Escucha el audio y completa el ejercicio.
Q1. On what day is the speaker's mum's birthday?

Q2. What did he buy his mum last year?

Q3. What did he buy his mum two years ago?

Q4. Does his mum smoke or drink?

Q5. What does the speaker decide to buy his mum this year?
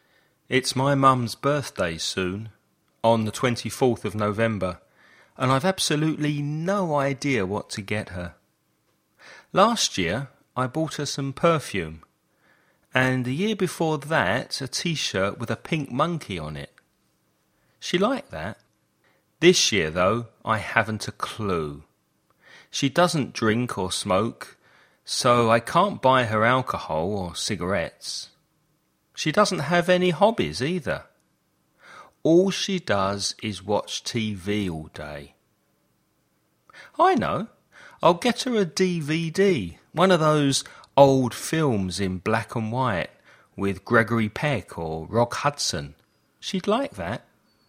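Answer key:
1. On the 24th of November
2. Some perfume
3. A t-shirt with a pink monkey on it
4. No, she doesn't
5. A DVD of an old black and white film

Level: nivel básico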